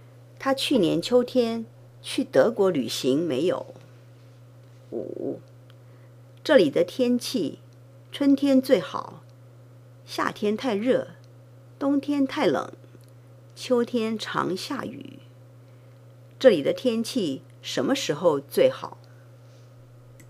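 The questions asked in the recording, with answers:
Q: 这里的天气什么时候最好?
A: 春天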